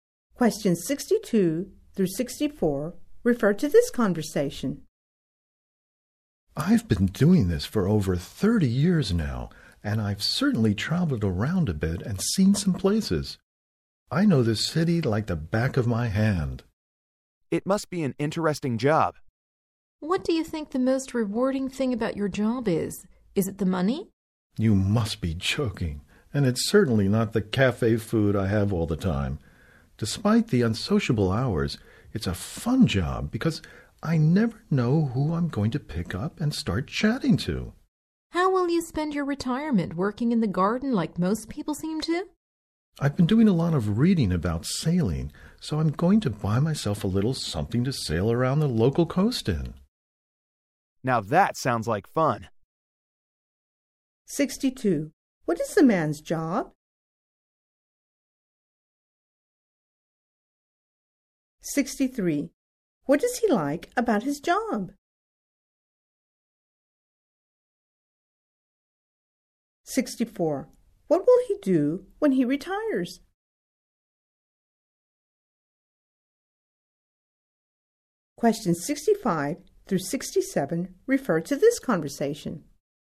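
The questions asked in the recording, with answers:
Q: What is the man's job?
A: Taxi driver

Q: What does he like about his job?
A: Meeting and chatting with different people

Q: What will he do when he retires?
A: Buy a boat and go sailing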